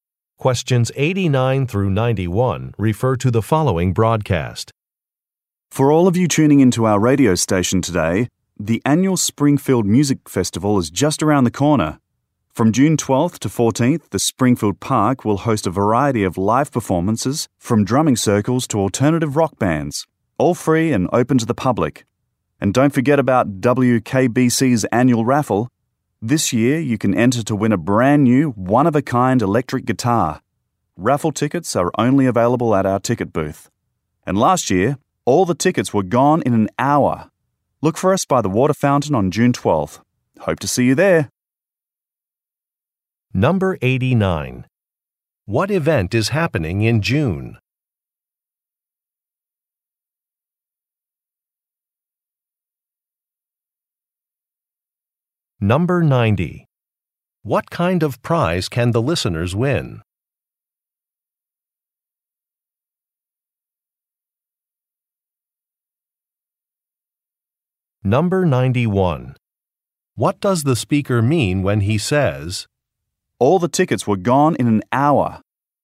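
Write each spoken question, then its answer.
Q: What event is happening in June?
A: The Springfield Music Festival

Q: What kind of prize can the listeners win?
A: An electric guitar

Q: What does the speaker mean when he says, "All the tickets were gone in an hour"?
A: Listeners should come early to get tickets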